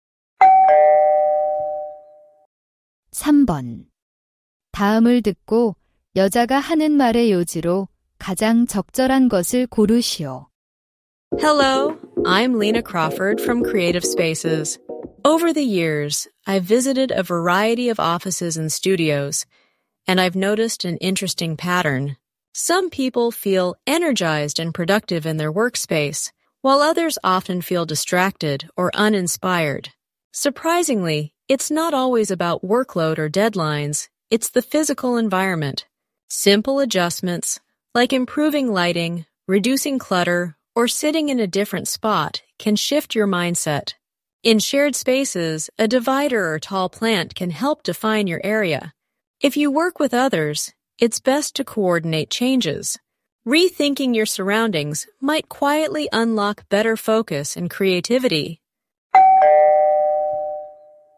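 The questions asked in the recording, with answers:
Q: 다음을 듣고 여자가 하는 말의 요지로 가장 적절한 것을 고르시오.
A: 작업 공간의 물리적 환경을 바꾸면 집중력과 창의력이 높아질 수 있다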